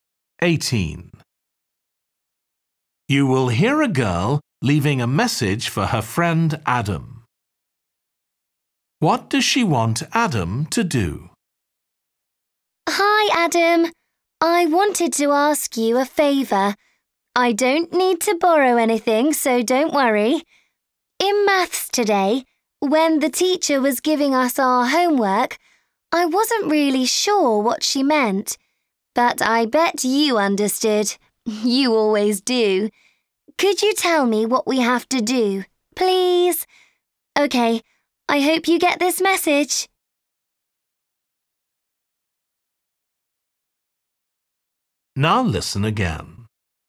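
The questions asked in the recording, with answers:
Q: What does she want Adam to do?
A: Explain the maths homework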